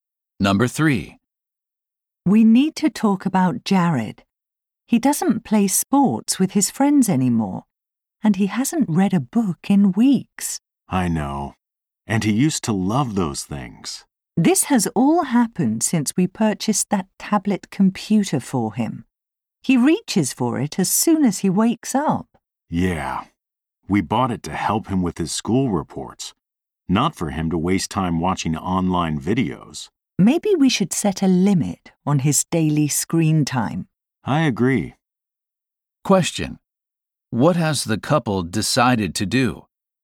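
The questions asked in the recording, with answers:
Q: What has the couple decided to do?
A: Limit Jared's daily screen time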